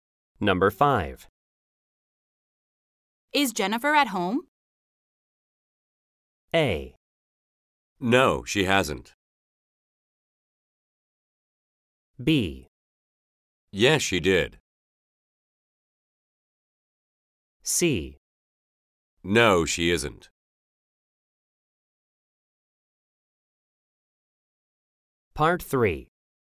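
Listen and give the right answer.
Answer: C: No, she isn't.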